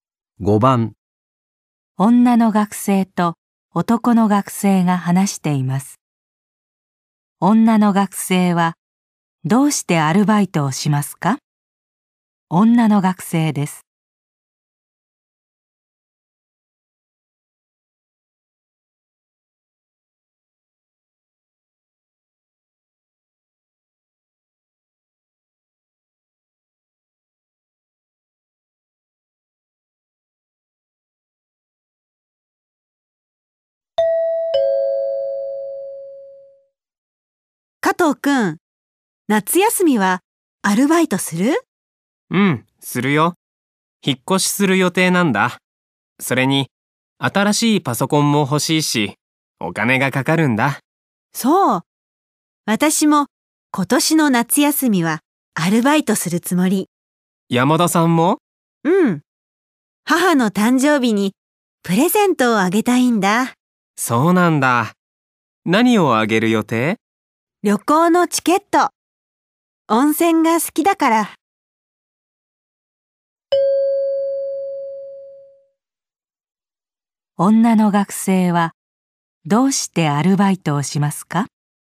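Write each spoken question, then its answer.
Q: 女の学生はどうしてアルバイトをしますか?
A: 母の誕生日にプレゼントをあげたいから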